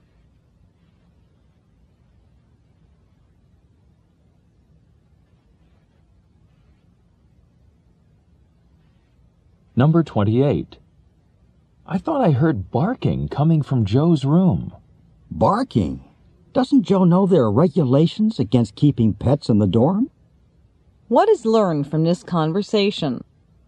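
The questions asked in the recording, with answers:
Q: What is learned from this conversation?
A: Joe may be keeping a pet in the dorm, which is against the rules.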